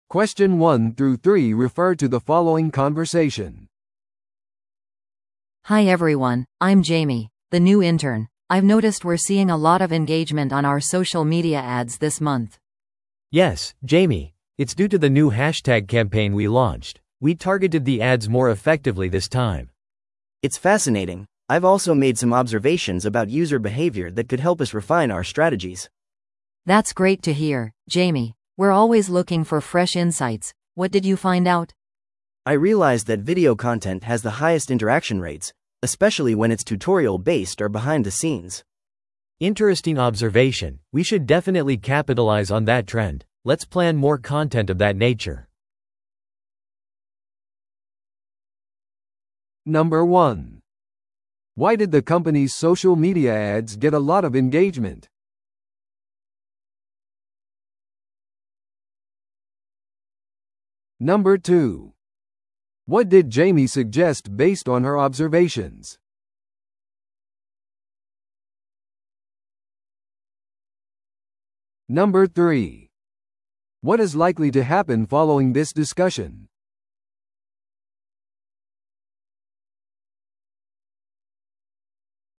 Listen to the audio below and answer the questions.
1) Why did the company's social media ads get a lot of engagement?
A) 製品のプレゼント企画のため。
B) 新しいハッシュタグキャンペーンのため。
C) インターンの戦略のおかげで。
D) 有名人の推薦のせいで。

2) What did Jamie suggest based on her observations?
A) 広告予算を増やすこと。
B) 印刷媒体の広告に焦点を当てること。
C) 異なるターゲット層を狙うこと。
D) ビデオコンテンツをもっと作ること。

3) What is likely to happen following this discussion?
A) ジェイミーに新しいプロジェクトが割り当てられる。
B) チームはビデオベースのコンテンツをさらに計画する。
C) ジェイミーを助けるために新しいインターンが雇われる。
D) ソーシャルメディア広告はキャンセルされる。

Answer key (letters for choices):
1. B
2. D
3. B

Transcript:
A: Hi everyone, I'm Jamie, the new intern. I've noticed we're seeing a lot of engagement on our social media ads this month.
B: Yes, Jamie. It's due to the new hashtag campaign we launched. We targeted the ads more effectively this time.
C: It's fascinating! I've also made some observations about user behavior that could help us refine our strategies.
A: That's great to hear, Jamie. We're always looking for fresh insights. What did you find out?
C: I realized that video content has the highest interaction rates, especially when it's tutorial-based or behind-the-scenes.
B: Interesting observation, we should definitely capitalize on that trend. Let's plan more content of that nature.